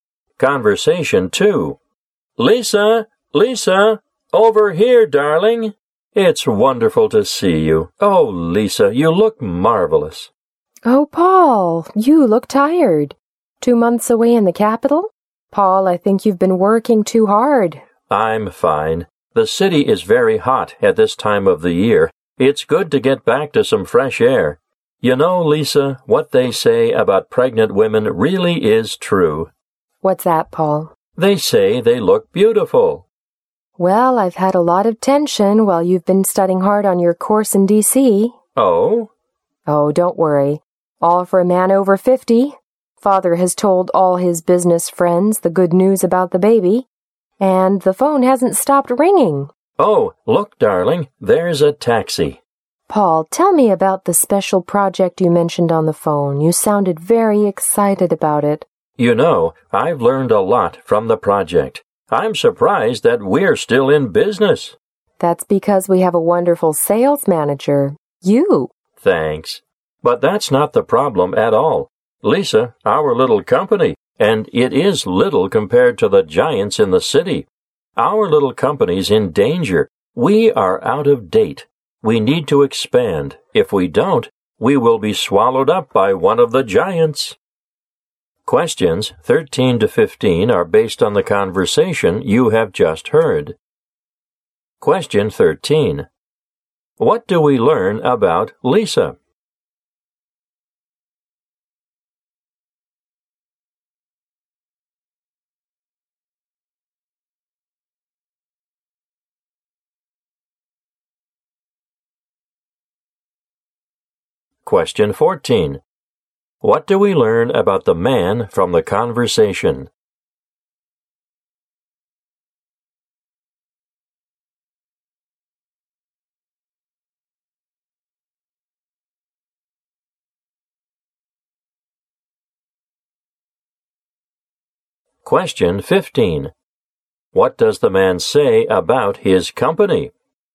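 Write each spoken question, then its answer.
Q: What do we learn about Lisa?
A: She is pregnant.

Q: What does the man say about his company?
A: It is in danger and needs to expand.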